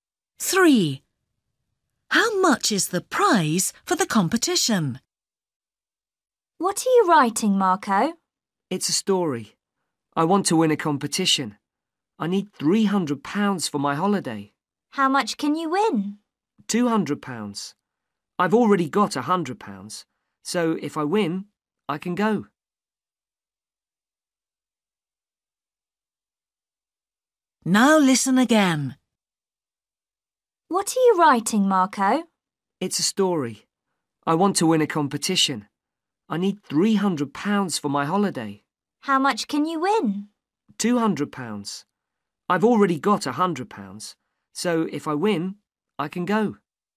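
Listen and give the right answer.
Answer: £200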